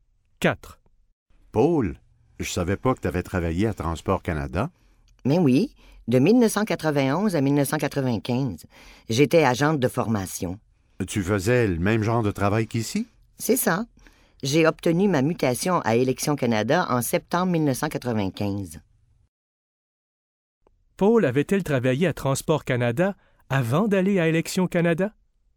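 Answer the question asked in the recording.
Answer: Oui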